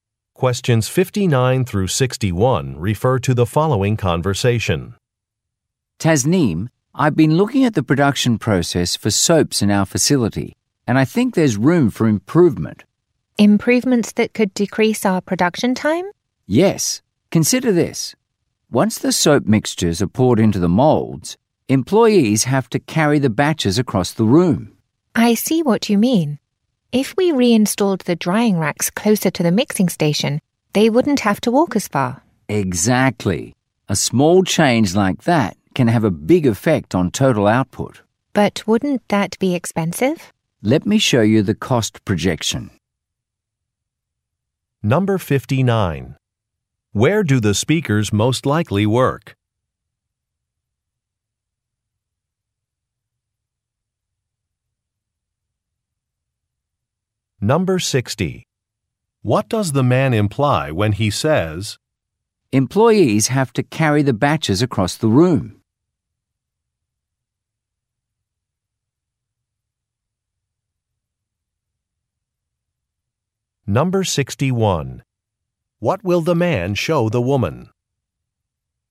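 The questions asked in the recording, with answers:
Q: Where do the speakers most likely work?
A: At a soap factory

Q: What will the man show the woman?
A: A cost projection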